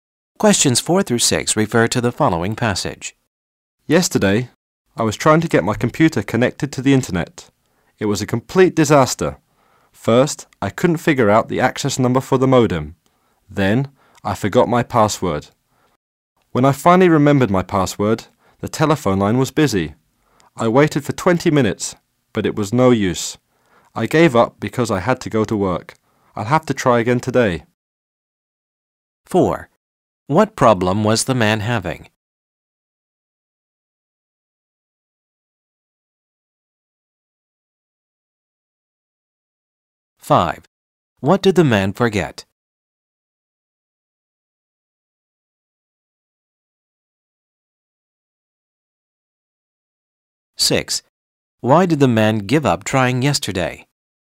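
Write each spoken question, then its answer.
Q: What problem was the man having?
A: Connecting his computer to the internet

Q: What did the man forget?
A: His password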